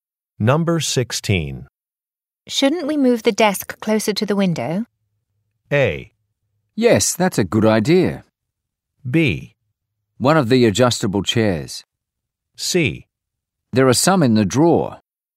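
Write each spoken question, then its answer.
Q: Shouldn't we move the desk closer to the window?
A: A: Yes, that's a good idea.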